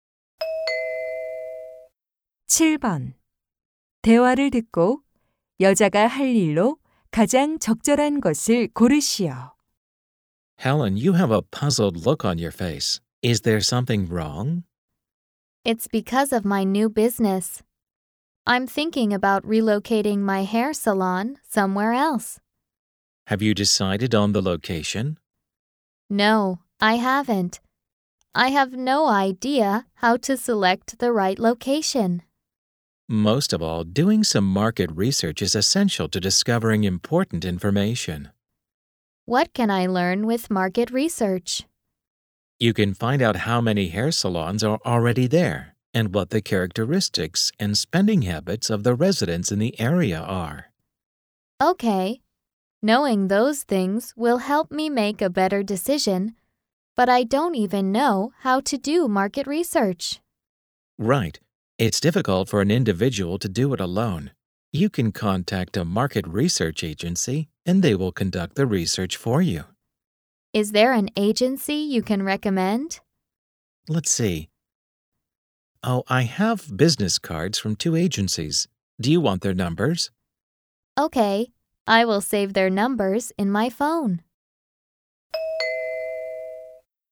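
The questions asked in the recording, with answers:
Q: 대화를 듣고 여자가 할 일로 가장 적절한 것을 고르시오.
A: 시장 조사 업체 전화번호를 휴대전화에 저장하기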